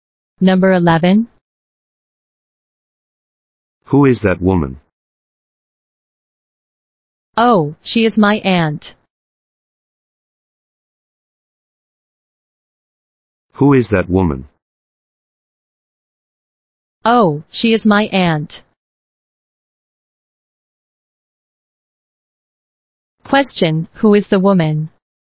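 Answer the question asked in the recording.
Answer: The speaker's aunt.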